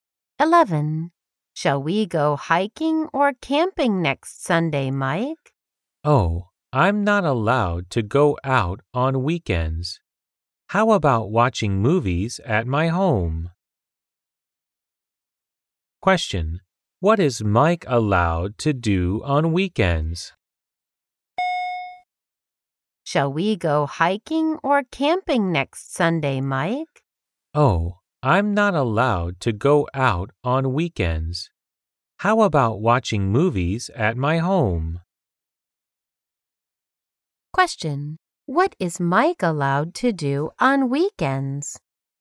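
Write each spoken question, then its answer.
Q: What is Mike allowed to do on weekends?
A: Watch movies at home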